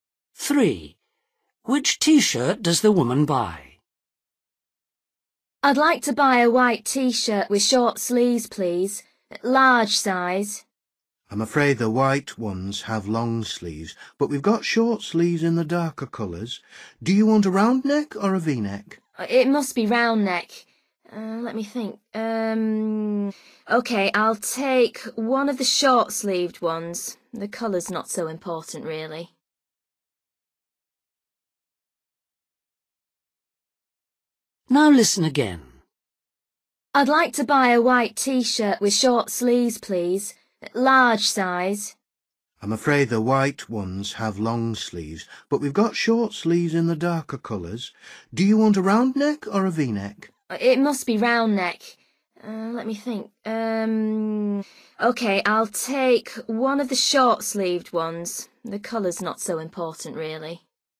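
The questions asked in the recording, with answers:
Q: Which T-shirt does the woman buy?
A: A dark-coloured short-sleeved T-shirt with a round neck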